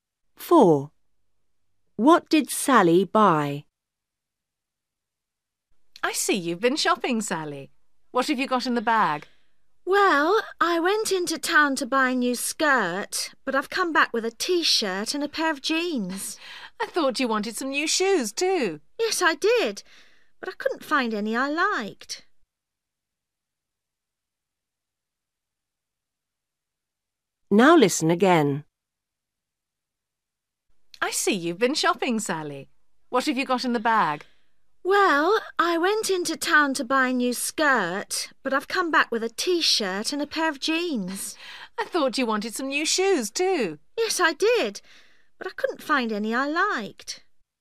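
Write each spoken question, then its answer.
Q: What did Sally buy?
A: A T-shirt and a pair of jeans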